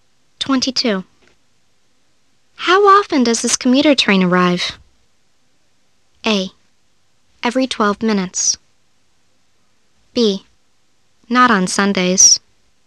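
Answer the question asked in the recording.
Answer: A: Every 12 minutes.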